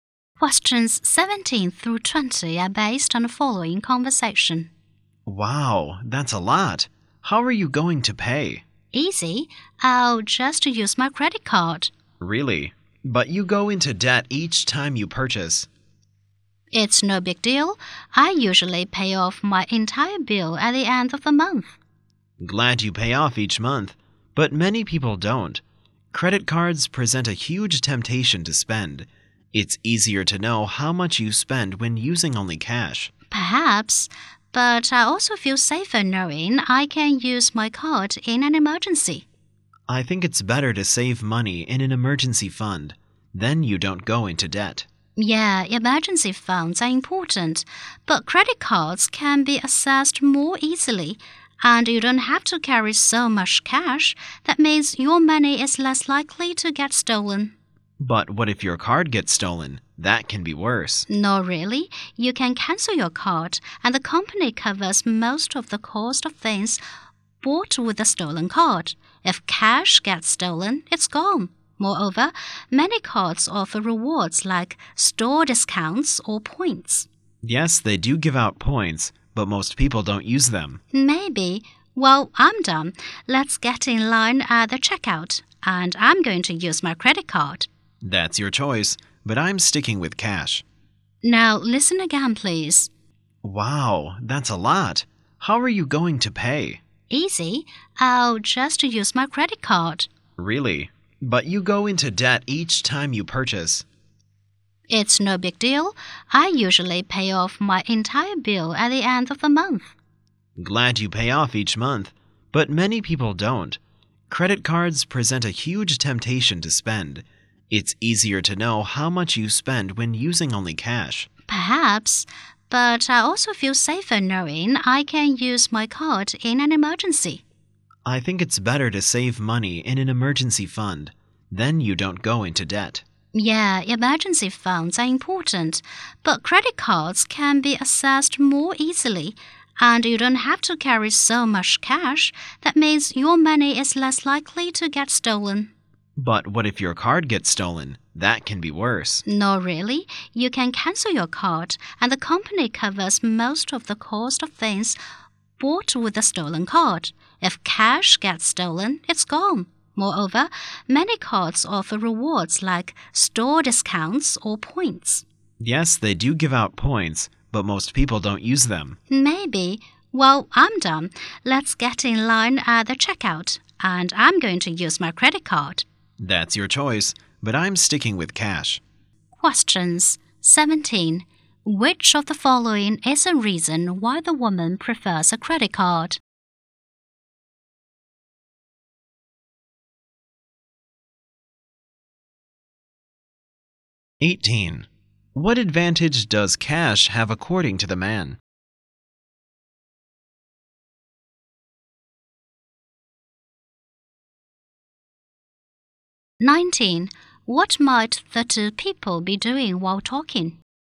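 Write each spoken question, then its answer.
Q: What advantage does cash have according to the man?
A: It's easier to know how much you spend.

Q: What might the two people be doing while talking?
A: Shopping in a store.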